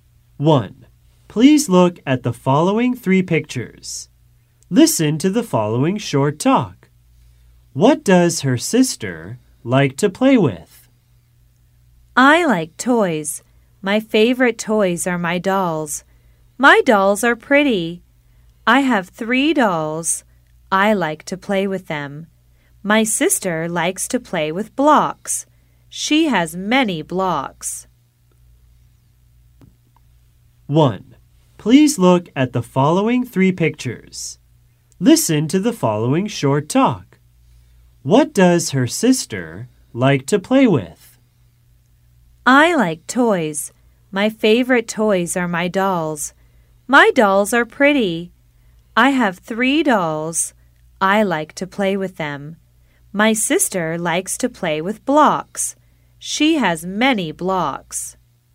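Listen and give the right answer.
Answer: Blocks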